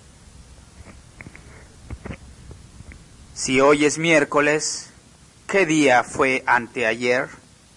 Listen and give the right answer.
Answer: Fue lunes.